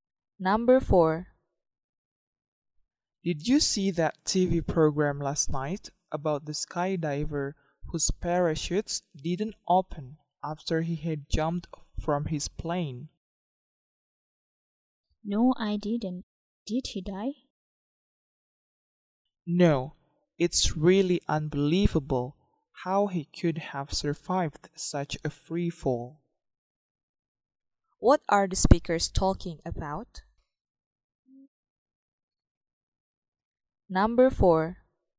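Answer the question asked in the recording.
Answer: A TV program about a skydiver who survived when his parachutes didn't open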